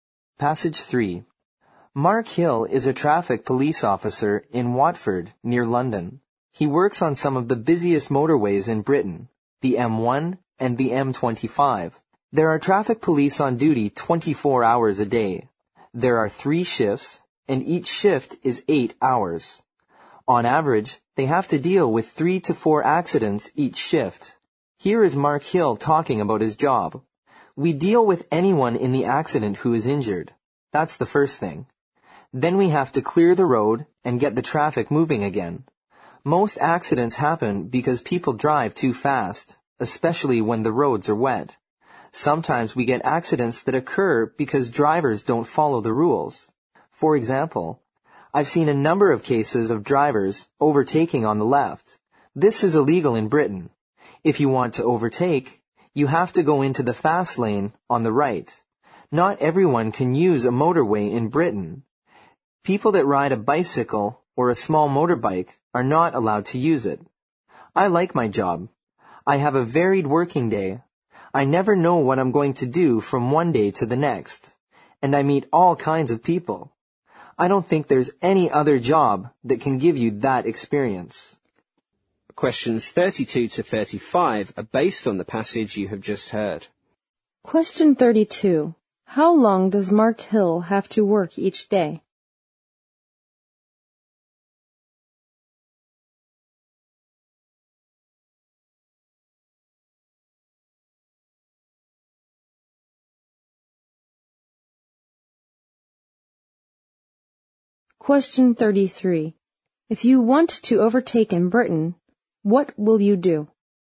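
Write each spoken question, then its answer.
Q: How long does Mark Hill have to work each day?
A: 8 hours

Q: If you want to overtake in Britain, what will you do?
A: Go into the fast lane on the right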